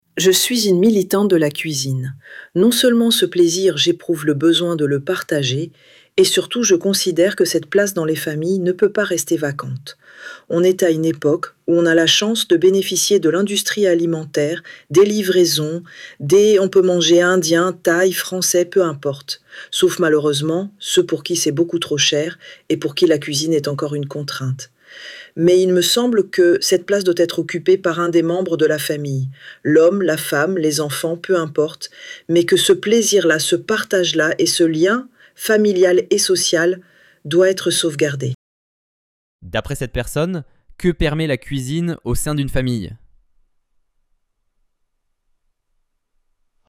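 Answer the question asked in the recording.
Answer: Elle permet de préserver le partage, le plaisir et le lien familial et social.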